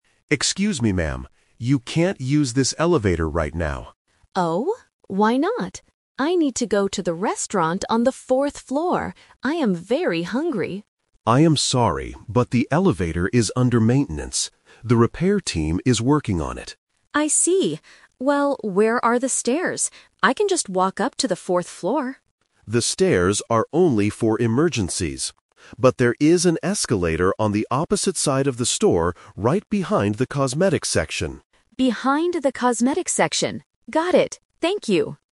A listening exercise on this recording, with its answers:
Listen to the conversation and choose the correct answer (A, B, or C) for each question.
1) Why can't the customer use the elevator?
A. It is only for emergencies.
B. It is under maintenance.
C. It is too crowded.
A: B. It is under maintenance.

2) Where does the customer want to go?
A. To the cosmetics section.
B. To the restaurant.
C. To the restroom.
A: B. To the restaurant.

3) How will the customer go up to the fourth floor?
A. By using the stairs.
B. By waiting for the elevator.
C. By using the escalator.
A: C. By using the escalator.

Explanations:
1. The guard clearly says, "the elevator is under maintenance. The repair team is working on it."
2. The customer states her destination in the beginning: "I need to go to the restaurant on the fourth floor."
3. This is "The Twist". The customer asks for the stairs, but the guard tells her to use the "escalator on the opposite side of the store." She agrees.

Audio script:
Guard: Excuse me, ma'am. You can't use this elevator right now.
Customer: Oh? Why not? I need to go to the restaurant on the fourth floor. I am very hungry.
Guard: I am sorry, but the elevator is under maintenance. The repair team is working on it.
Customer: I see. Well, where are the stairs? I can just walk up to the fourth floor.
Guard: The stairs are only for emergencies. But there is an escalator on the opposite side of the store, right behind the cosmetics section.

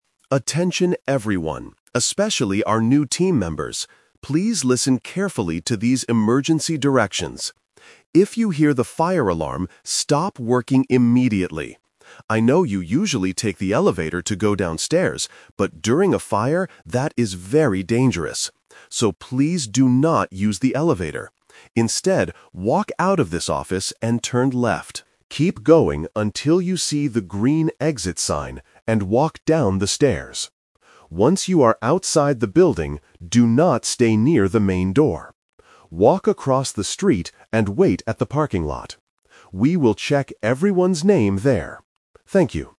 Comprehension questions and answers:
Listen to a manager giving instructions to the staff. Choose the correct answer (A, B, or C) for each question.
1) How should the employees go downstairs during a fire?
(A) By taking the elevator.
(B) By walking down the stairs.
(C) By running out the main door.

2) Which way should they go when they leave the office?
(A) Turn left.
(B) Turn right.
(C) Walk straight.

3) Where must everyone wait after they leave the building?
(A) Next to the stairs.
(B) Near the main door.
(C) At the parking lot.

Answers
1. (B) By walking down the stairs.
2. (A) Turn left.
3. (C) At the parking lot.

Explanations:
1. The Key: The manager clearly instructs: "walk down the stairs." The Trap: Option (A) is the exact trap ("The Twist"). The manager mentions that people usually take the elevator, but strictly says "do not use the elevator" during a fire.
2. The Key: The manager gives a direct instruction: "walk out of this office and turn left." The Trap: Options (B) and (C) are plausible directions, but they are incorrect according to the audio.
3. The Key: The final instruction is: "Walk across the street and wait at the parking lot." The Trap: Option (B) is explicitly mentioned but rejected (The manager says, "do not stay near the main door"). Option (A) is a location inside the building, not the final meeting point.

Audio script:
Manager: Attention everyone, especially our new team members. Please listen carefully to these emergency directions. If you hear the fire alarm, stop working immediately. I know you usually take the elevator to go downstairs, but during a fire, that is very dangerous. So, please do not use the elevator. Instead, walk out of this office and turn left. Keep going until you see the green exit sign, and walk down the stairs. Once you are outside the building, do not stay near the main door. Walk across the street and wait at the parking lot. We will check everyone's name there. Thank you.

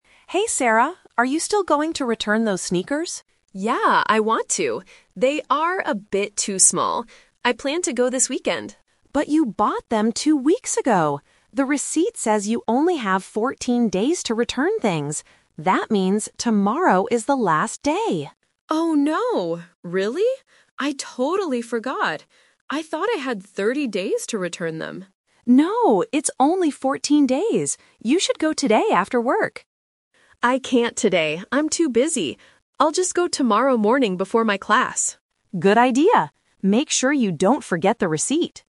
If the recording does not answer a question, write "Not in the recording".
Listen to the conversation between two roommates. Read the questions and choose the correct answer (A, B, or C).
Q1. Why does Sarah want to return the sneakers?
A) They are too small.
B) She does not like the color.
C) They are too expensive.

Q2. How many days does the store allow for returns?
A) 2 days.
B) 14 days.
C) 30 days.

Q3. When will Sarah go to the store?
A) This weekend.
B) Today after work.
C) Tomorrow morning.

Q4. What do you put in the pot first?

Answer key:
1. A) They are too small.
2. B) 14 days.
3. C) Tomorrow morning.
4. Not in the recording

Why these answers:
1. Sarah explicitly says, "They are a bit too small." Why the trap is wrong: Options (B) and (C) are plausible reasons for returning an item, but they are never mentioned in the conversation.
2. Emma reads the rule and says, "The receipt says you only have 14 days to return things." Why the trap is wrong: Option (C) is a major trap. Sarah says, "I thought I had 30 days," but this was her misunderstanding, not the actual store policy.
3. This is the "Twist" technique. Sarah's final decision is: "I'll just go tomorrow morning before my class." Why the trap is wrong: Option (A) is her original plan, but she has to change it because the deadline is tomorrow. Option (B) is Emma's suggestion, but Sarah rejects it because she is "too busy" today.

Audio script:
Emma: Hey Sarah, are you still going to return those sneakers?
Sarah: Yeah, I want to. They are a bit too small. I plan to go this weekend.
Emma: But you bought them two weeks ago! The receipt says you only have 14 days to return things. That means tomorrow is the last day.
Sarah: Oh no, really? I totally forgot. I thought I had 30 days to return them.
Emma: No, it's only 14 days. You should go today after work.
Sarah: I can't today, I'm too busy. I'll just go tomorrow morning before my class.
Emma: Good idea. Make sure you don't forget the receipt!

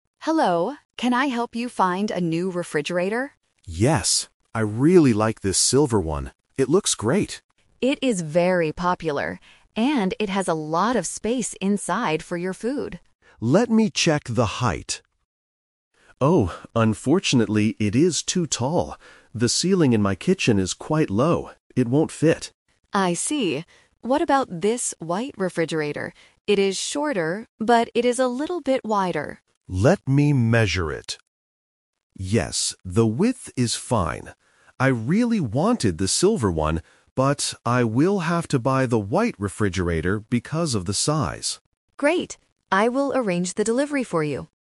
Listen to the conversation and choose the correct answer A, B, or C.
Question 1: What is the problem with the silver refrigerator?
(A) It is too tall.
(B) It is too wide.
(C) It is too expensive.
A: (A) It is too tall.

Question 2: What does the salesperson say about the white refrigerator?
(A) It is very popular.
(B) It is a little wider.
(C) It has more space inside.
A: (B) It is a little wider.

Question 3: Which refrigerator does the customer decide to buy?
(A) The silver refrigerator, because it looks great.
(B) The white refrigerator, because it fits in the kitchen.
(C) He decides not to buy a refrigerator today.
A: (B) The white refrigerator, because it fits in the kitchen.

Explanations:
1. The customer measures the height and says, "Unfortunately, it is too tall," noting that it won't fit under the low kitchen ceiling. Option (B) is a trap because "wide" describes the white refrigerator. Option (C) might sound logical when shopping, but it is not mentioned in the audio.
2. The shop assistant introduces the white refrigerator and says, "It is shorter, but it is a little bit wider." Options (A) and (C) are distractors because those features—"very popular" and "a lot of space inside"—actually describe the silver refrigerator.
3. This question uses a "twist" technique. Initially, the customer really likes the silver refrigerator because it looks nice, but he has to change his mind because it doesn't fit in his kitchen. In the end, he decides to buy the white one. Option (A) is a trap representing his initial intention, while Option (C) is completely inconsistent with the events.

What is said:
Salesperson: Hello, can I help you find a new refrigerator?
Customer: Yes. I really like this silver one. It looks great.
Salesperson: It is very popular. And it has a lot of space inside for your food.
Customer: Let me check the height... Oh, unfortunately, it is too tall. The ceiling in my kitchen is quite low. It won't fit.
Salesperson: I see. What about this white refrigerator? It is shorter, but it is a little bit wider.
Customer: Let me measure it... Yes, the width is fine. I really wanted the silver one, but I will have to buy the white refrigerator because of the size.

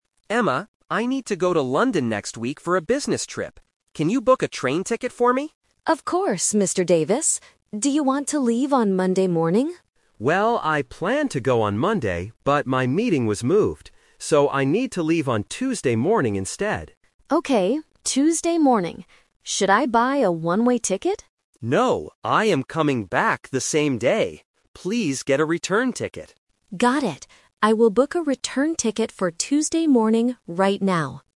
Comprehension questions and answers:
Listen to the conversation between a manager and his assistant. Choose the correct answer (A, B, or C).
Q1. When will Mr. Davis leave for London?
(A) Monday morning.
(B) Tuesday morning.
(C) Wednesday morning.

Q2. Why did Mr. Davis change his travel day?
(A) Because his meeting was moved.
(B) Because he was sick.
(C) Because the train was full.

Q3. What kind of ticket will Emma buy?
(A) A one-way ticket.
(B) Two one-way tickets.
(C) A return ticket.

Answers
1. (B) Tuesday morning.
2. (A) Because his meeting was moved.
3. (C) A return ticket.

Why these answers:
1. This uses "The Twist". Mr. Davis says, "I planned to go on Monday" (Option A - The Trap), but things changed. His final decision is, "I need to leave on Tuesday morning instead." Option (C) is never mentioned.
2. Mr. Davis explains the reason for the change clearly: "but my meeting was moved." Options (B) and (C) are plausible reasons for changing a train ticket, but they are not mentioned in the audio.
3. Emma asks if she should buy a "one-way ticket" (Option A - The Trap). Mr. Davis rejects this and says, "Please get a return ticket." Option (B) is not mentioned.

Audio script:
Mr. Davis: Emma, I need to go to London next week for a business trip. Can you book a train ticket for me?
Emma: Of course, Mr. Davis. Do you want to leave on Monday morning?
Mr. Davis: Well, I planned to go on Monday, but my meeting was moved. So, I need to leave on Tuesday morning instead.
Emma: Okay, Tuesday morning. Should I buy a one-way ticket?
Mr. Davis: No, I am coming back the same day. Please get a return ticket.

